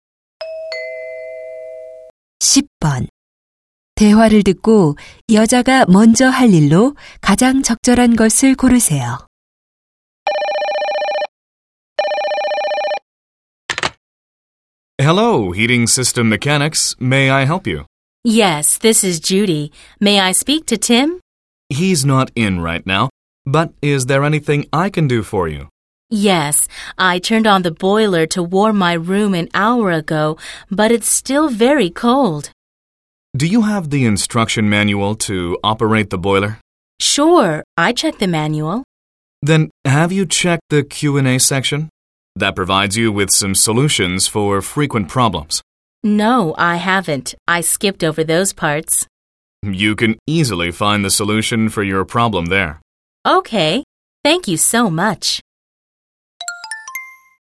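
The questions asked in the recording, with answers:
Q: 대화를 듣고 여자가 먼저 할 일로 가장 적절한 것을 고르세요.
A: 설명서의 Q&A 부분 확인하기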